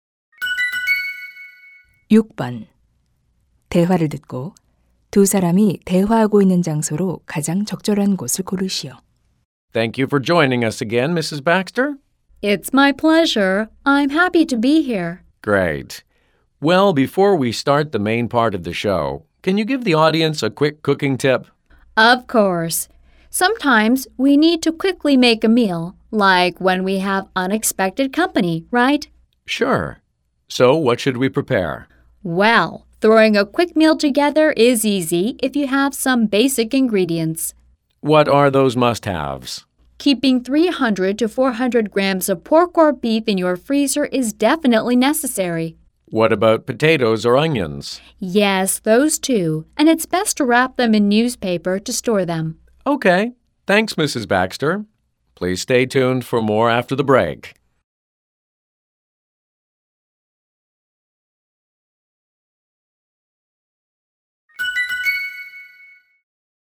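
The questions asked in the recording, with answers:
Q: 대화를 듣고 두 사람이 대화하고 있는 장소로 가장 적절한 곳을 고르시오.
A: 요리 방송 스튜디오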